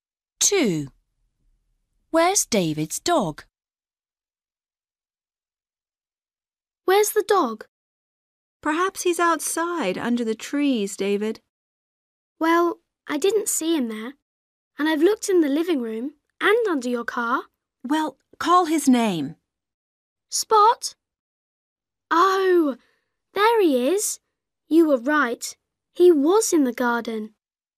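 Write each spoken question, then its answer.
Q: Where's David's dog?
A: in the garden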